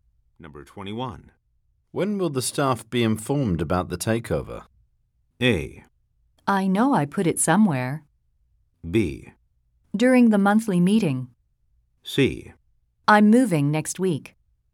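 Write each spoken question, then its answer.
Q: When will the staff be informed about the takeover?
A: B: During the monthly meeting.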